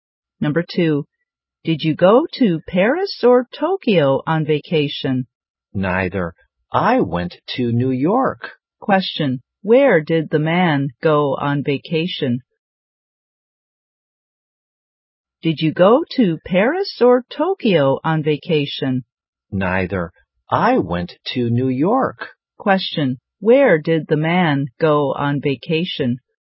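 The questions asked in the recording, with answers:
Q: where did the man go on vacation?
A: New York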